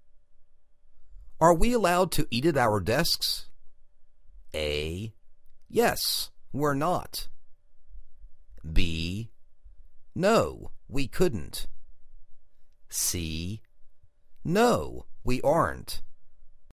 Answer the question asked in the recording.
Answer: No, we aren't